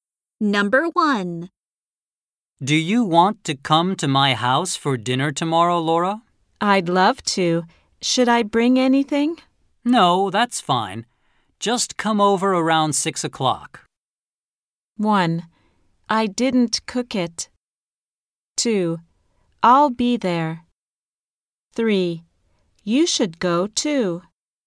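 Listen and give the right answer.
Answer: 2: I'll be there.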